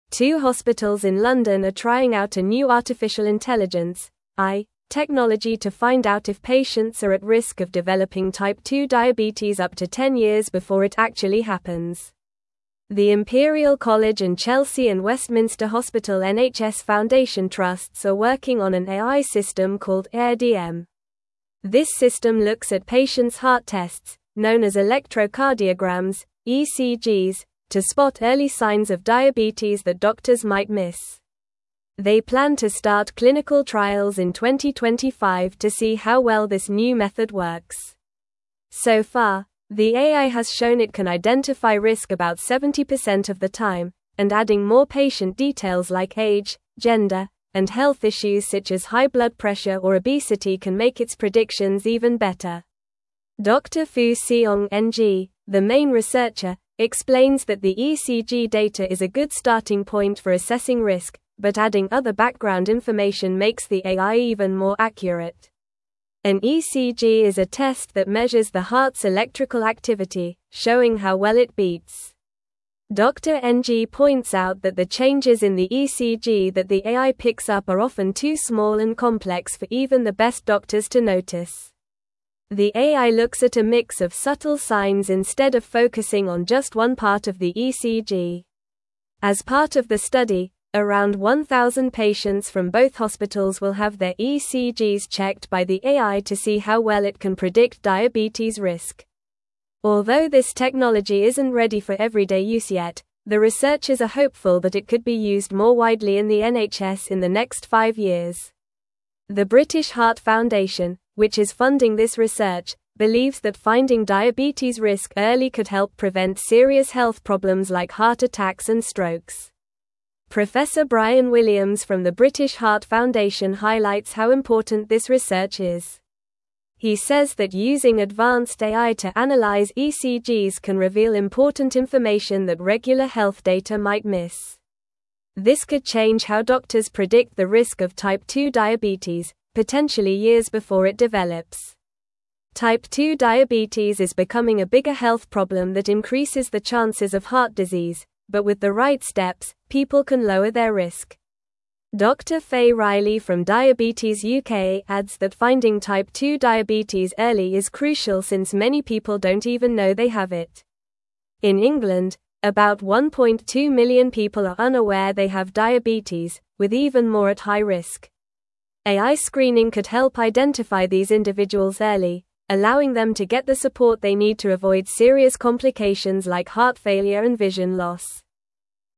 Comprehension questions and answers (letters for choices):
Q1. What is the name of the AI system being tested for diabetes risk prediction?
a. Diabetech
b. HealthAI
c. CardioPredict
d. Aire-DM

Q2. Which two hospitals in London are involved in the AI diabetes research?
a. St. Thomas' Hospital and Guy's Hospital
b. Royal London Hospital and University College London Hospital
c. King's College Hospital and Barts Health NHS Trust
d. Imperial College and Chelsea and Westminster Hospital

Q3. What type of test does the AI system analyze to assess diabetes risk?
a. Blood tests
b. Electrocardiograms (ECGs)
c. MRI scans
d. X-rays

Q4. How accurate has the AI shown to be in identifying diabetes risk so far?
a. About 70% of the time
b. About 50% of the time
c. About 90% of the time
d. About 30% of the time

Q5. What additional patient details can improve the AI's predictions?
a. Height and weight only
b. Family history of diseases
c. Age, gender, and health issues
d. Lifestyle choices like diet and exercise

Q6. What serious health problems could early detection of diabetes help prevent?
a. Cancers and infections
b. Heart attacks and strokes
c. Allergies and asthma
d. Broken bones and sprains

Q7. How many people in England are unaware they have diabetes, according to the article?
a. About 500,000 people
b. About 2 million people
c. About 1.2 million people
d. About 750,000 people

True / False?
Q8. Adding more patient information, such as age and health issues, can worsen the AI's predictions.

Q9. So far, the AI has been able to identify diabetes risk with about 70% accuracy.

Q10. Two hospitals in London are testing a new AI technology to predict the risk of developing type 2 diabetes up to ten years in advance.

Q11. The AI system being used is called Aire-DM and analyzes patients' electrocardiograms (ECGs) to find early signs of diabetes.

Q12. In England, more than 1.2 million people are aware they have diabetes, highlighting the importance of early detection through AI screening.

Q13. Around 2,000 patients from the participating hospitals will have their ECGs analyzed by the AI as part of the study.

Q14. The British Heart Foundation is funding this research because early detection of diabetes risk can help prevent serious health issues.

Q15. Clinical trials for this AI technology are set to begin in 2023.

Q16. Two hospitals in London are trying out a new artificial intelligence (AI) technology to find out if patients are at risk of developing type 2 (1)______ up to ten years before it actually happens.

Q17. The Imperial College and Chelsea and Westminster (2)______ NHS Foundation Trusts are working on an AI system called Aire-DM.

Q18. This system looks at patients' heart tests, known as electrocardiograms (ECGs), to spot early signs of diabetes that (3)______ might miss.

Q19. They plan to start clinical trials in 2025 to see how well this new (4)______ works.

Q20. Dr. Fu Siong Ng, the main researcher, explains that the ECG data is a good starting (5)______ for assessing risk, but adding other background information (6)______ the AI even more accurate.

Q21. Dr. Fu Siong Ng, the main researcher, explains that the ECG data is a good starting (5)______ for assessing risk, but adding other background information (6)______ the AI even more accurate.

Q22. An ECG is a test that measures the heart's electrical (7)______, showing how well it beats.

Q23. The AI looks at a mix of (8)______ signs instead of focusing on just one part of the ECG.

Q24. Although this (9)______ isn't ready for everyday use yet, the (10)______ers are (12)______ that it could be used more widely in the NHS in the next five years.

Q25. Although this (9)______ isn't ready for everyday use yet, the (10)______ers are (12)______ that it could be used more widely in the NHS in the next five years.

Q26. Although this (9)______ isn't ready for everyday use yet, the (10)______ers are (12)______ that it could be used more widely in the NHS in the next five years.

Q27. This could (13)______ how doctors predict the risk of type 2 diabetes, potentially years before it develops.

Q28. Type 2 diabetes is becoming a bigger health problem that increases the chances of (14)______ disease, but with the right (15)______, people can lower their risk.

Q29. Type 2 diabetes is becoming a bigger health problem that increases the chances of (14)______ disease, but with the right (15)______, people can lower their risk.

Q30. AI screening could help identify these individuals early, allowing them to get the support they need to avoid serious (16)______ like heart failure and vision loss.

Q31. What is the name of the AI system being tested by the two hospitals in London?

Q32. How does the AI system Aire-DM determine if patients are at risk of developing type 2 diabetes?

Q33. What other patient details can improve the AI's predictions about diabetes risk?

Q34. What are some serious health problems that early identification of diabetes risk could help prevent?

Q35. How does the British Heart Foundation view the importance of this research on diabetes risk prediction?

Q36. Why is it crucial to find type 2 diabetes early, according to Dr. Faye Riley from Diabetes UK?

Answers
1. d
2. d
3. b
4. a
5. c
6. b
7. c
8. False
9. True
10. True
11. True
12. False
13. False
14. True
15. False
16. diabetes
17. Hospital
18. doctors
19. method
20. point
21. makes
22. activity
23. subtle
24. technology
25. research
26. hopeful
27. change
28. heart
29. steps
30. complications
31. The name of the AI system being tested is Aire-DM.
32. Aire-DM determines diabetes risk by analyzing patients' electrocardiograms (ECGs) to spot early signs that doctors might miss.
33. Other patient details that can improve predictions include age, gender, and health issues such as high blood pressure or obesity.
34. Early identification of diabetes risk could help prevent serious health problems like heart attacks and strokes.
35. The British Heart Foundation views this research as very important because it could change how doctors predict diabetes risk and help identify it years before it develops.
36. According to Dr. Faye Riley, finding type 2 diabetes early is crucial because many people don't even know they have it, and early identification can help them get the support they need to avoid serious complications.

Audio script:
Two hospitals in London are trying out a new artificial intelligence (AI) technology to find out if patients are at risk of developing type 2 diabetes up to ten years before it actually happens. The Imperial College and Chelsea and Westminster Hospital NHS Foundation Trusts are working on an AI system called Aire-DM. This system looks at patients' heart tests, known as electrocardiograms (ECGs), to spot early signs of diabetes that doctors might miss. They plan to start clinical trials in 2025 to see how well this new method works. So far, the AI has shown it can identify risk about 70% of the time, and adding more patient details like age, gender, and health issues such as high blood pressure or obesity can make its predictions even better.
Dr. Fu Siong Ng, the main researcher, explains that the ECG data is a good starting point for assessing risk, but adding other background information makes the AI even more accurate. An ECG is a test that measures the heart's electrical activity, showing how well it beats. Dr. Ng points out that the changes in the ECG that the AI picks up are often too small and complex for even the best doctors to notice. The AI looks at a mix of subtle signs instead of focusing on just one part of the ECG.
As part of the study, around 1,000 patients from both hospitals will have their ECGs checked by the AI to see how well it can predict diabetes risk. Although this technology isn't ready for everyday use yet, the researchers are hopeful that it could be used more widely in the NHS in the next five years. The British Heart Foundation, which is funding this research, believes that finding diabetes risk early could help prevent serious health problems like heart attacks and strokes.
Professor Bryan Williams from the British Heart Foundation highlights how important this research is. He says that using advanced AI to analyze ECGs can reveal important information that regular health data might miss. This could change how doctors predict the risk of type 2 diabetes, potentially years before it develops. Type 2 diabetes is becoming a bigger health problem that increases the chances of heart disease, but with the right steps, people can lower their risk. Dr. Faye Riley from Diabetes UK adds that finding type 2 diabetes early is crucial since many people don't even know they have it. In England, about 1.2 million people are unaware they have diabetes, with even more at high risk. AI screening could help identify these individuals early, allowing them to get the support they need to avoid serious complications like heart failure and vision loss.

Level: Level 3